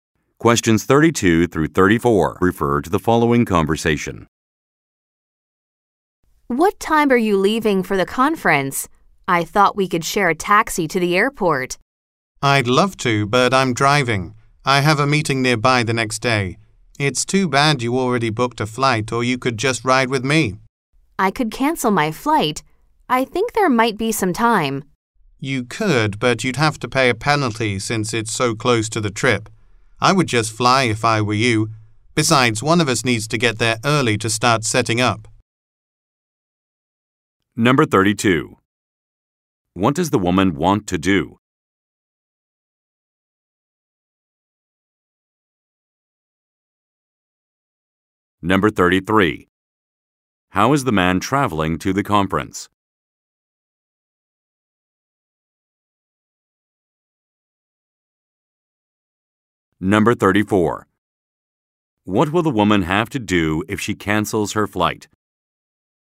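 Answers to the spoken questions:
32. Share a taxi to the airport
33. By car (he is driving)
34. Pay a penalty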